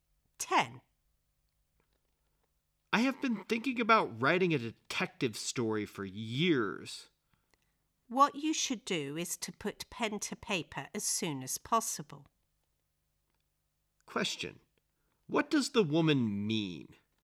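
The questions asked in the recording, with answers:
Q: What does the woman mean?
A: The man should start writing the story as soon as possible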